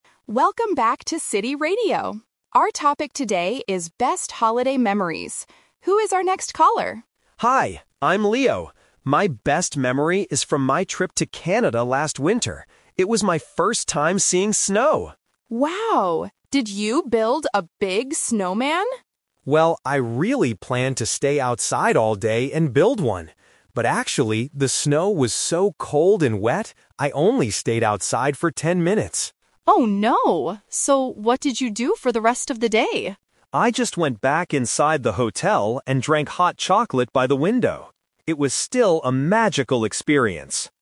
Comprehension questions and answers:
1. What did Leo actually do outside in the snow?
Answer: He stayed outside for ten minutes.

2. Why didn't Leo stay outside all day?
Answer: The snow was too cold and wet.

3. What did Leo do when he went back inside?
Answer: He drank hot chocolate.

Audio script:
DJ: Welcome back to City Radio! Our topic today is "Best Holiday Memories". Who is our next caller?
Caller: Hi, I'm Leo. My best memory is from my trip to Canada last winter. It was my first time seeing snow!
DJ: Wow! Did you build a big snowman?
Caller: Well, I really planned to stay outside all day and build one. But actually, the snow was so cold and wet! I only stayed outside for ten minutes.
DJ: Oh no! So what did you do for the rest of the day?
Caller: I just went back inside the hotel and drank hot chocolate by the window. It was still a magical experience.